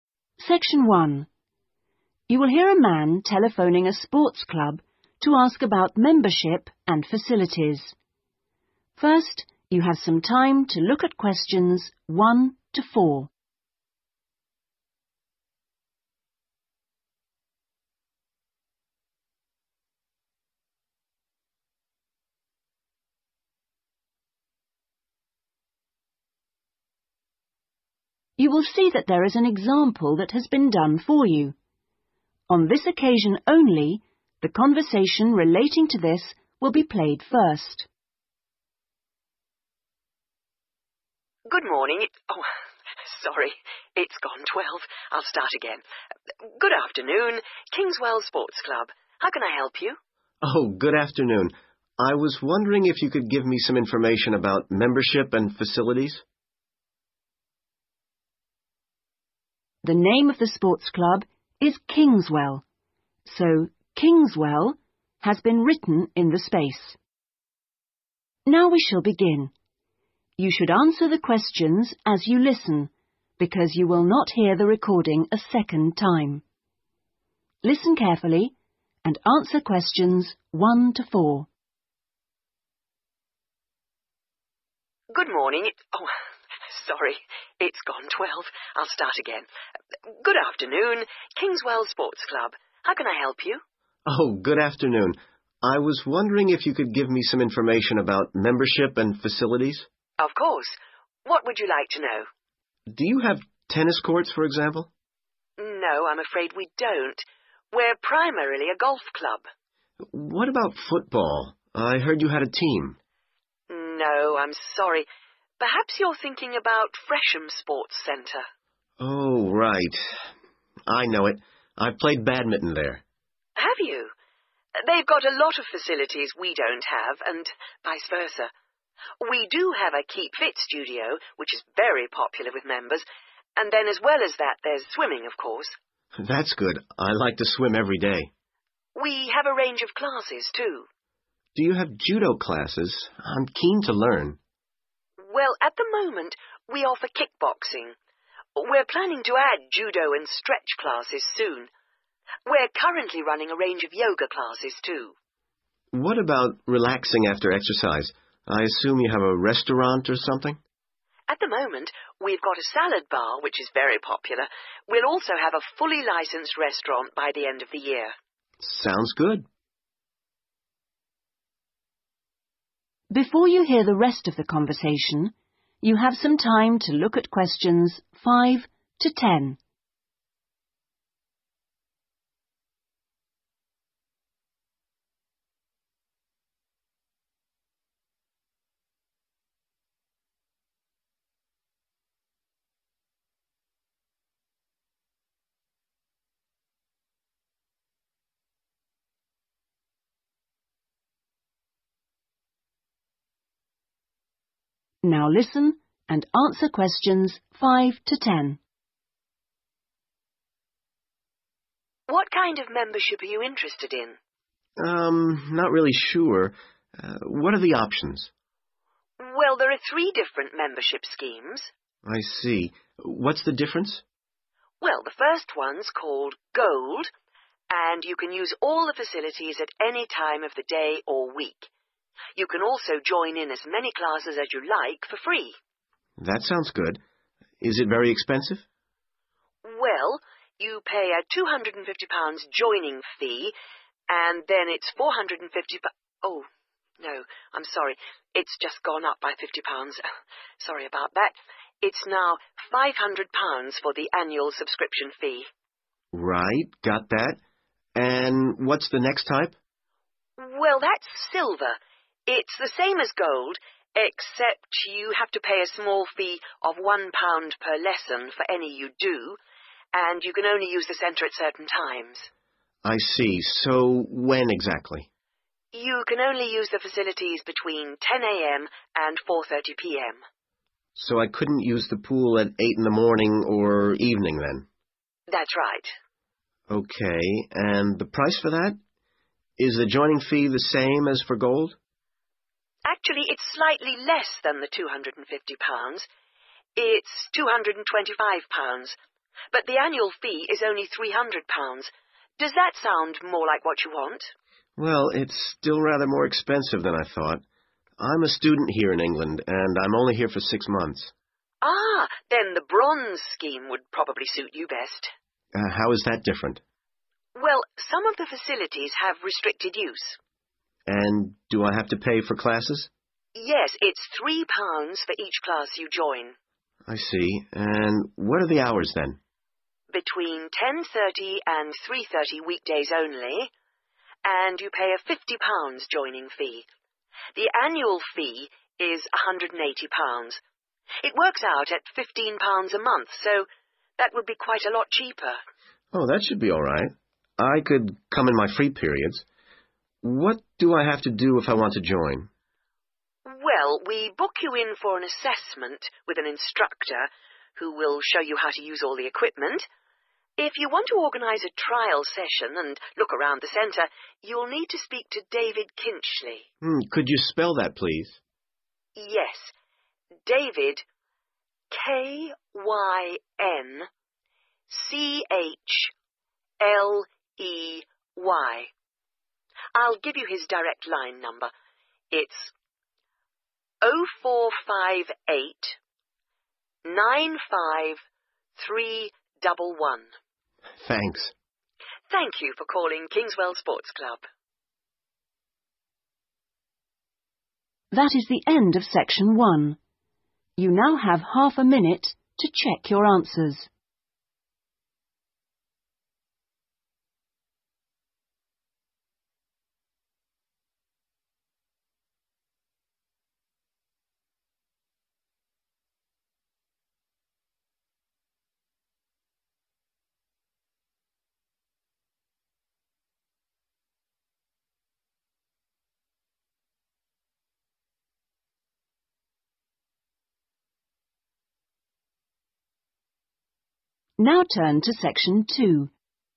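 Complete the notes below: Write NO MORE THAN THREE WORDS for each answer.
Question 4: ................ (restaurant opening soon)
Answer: salad bar

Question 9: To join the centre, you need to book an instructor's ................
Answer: assessment

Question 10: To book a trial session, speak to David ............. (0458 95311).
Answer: Kynchley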